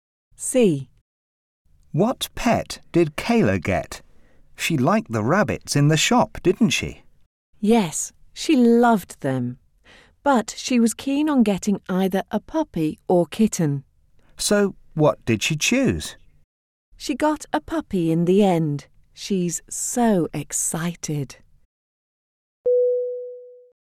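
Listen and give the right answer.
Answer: A puppy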